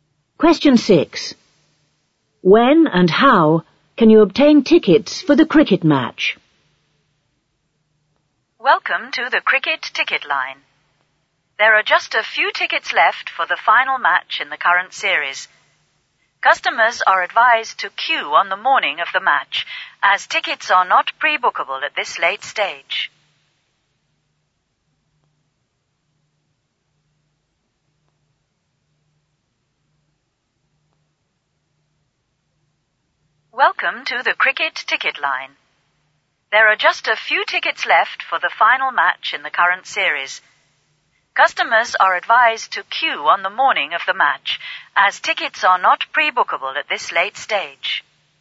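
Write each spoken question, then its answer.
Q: When and how can you obtain tickets for the cricket match?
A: By queuing on the morning of the match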